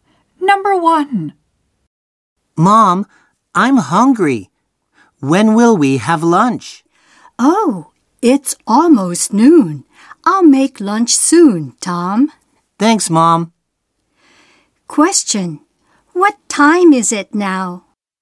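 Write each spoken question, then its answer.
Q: What time is it now?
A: Almost noon.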